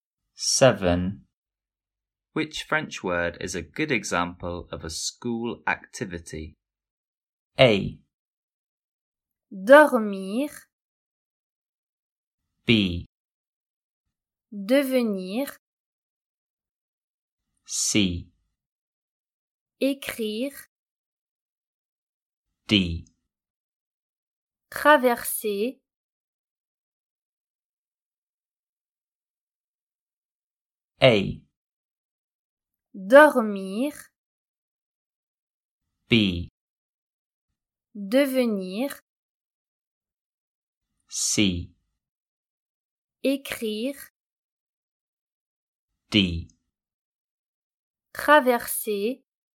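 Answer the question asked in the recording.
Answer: C: Écrire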